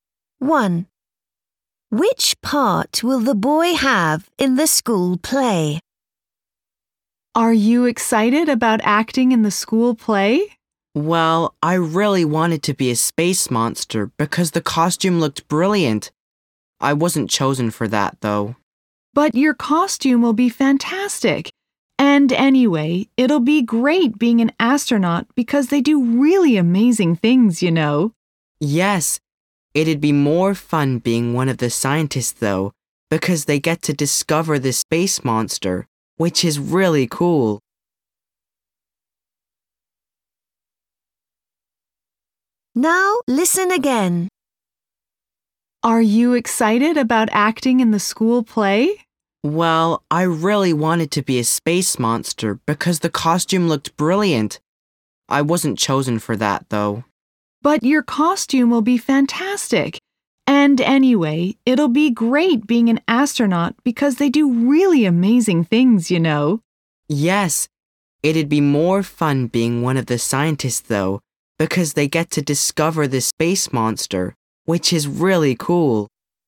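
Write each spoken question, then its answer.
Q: Which part will the boy have in the school play?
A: An astronaut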